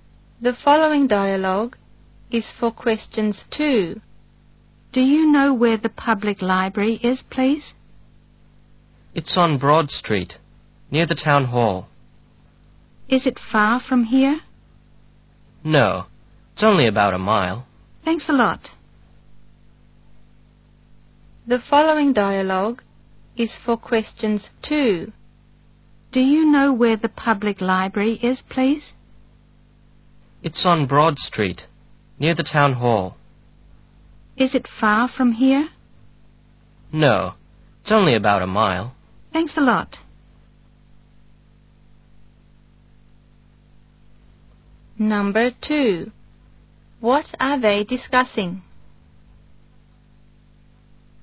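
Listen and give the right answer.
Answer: Where the public library is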